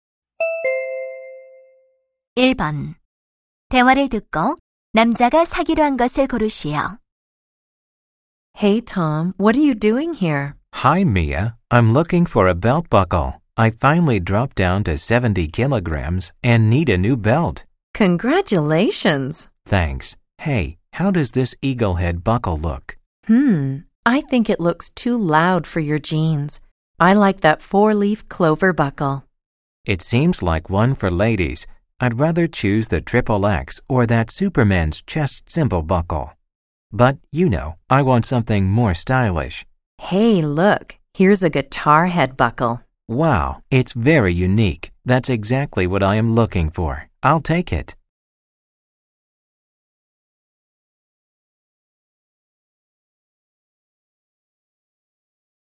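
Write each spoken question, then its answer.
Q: 대화를 듣고 남자가 사기로 한 것을 고르시오.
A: 기타 헤드 모양의 벨트 버클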